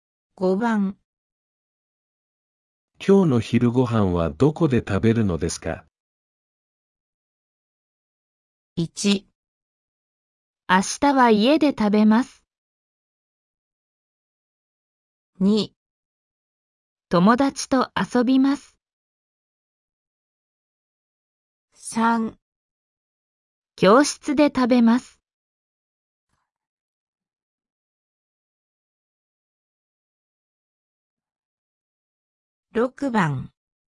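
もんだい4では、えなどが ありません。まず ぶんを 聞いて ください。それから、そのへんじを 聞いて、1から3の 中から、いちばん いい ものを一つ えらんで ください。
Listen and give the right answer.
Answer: 3

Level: N4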